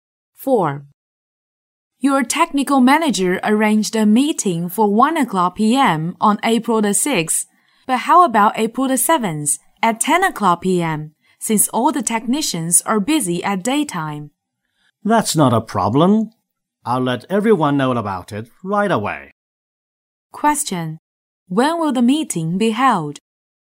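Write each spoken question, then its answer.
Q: When will the meeting be held?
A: At 10 p.m. on April 7th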